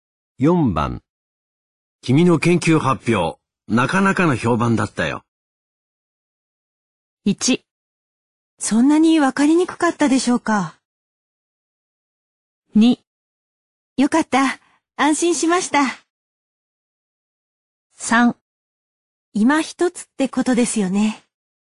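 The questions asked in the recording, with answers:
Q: 君の研究発表、なかなかの評判だったよ。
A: 2: よかった。安心しました。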